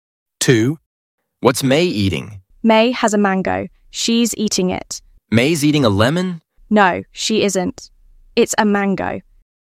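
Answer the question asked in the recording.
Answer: a mango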